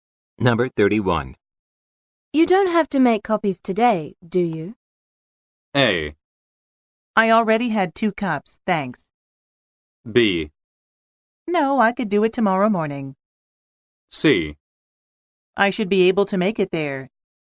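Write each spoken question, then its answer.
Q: You don't have to make copies today, do you?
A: B: No, I could do it tomorrow morning.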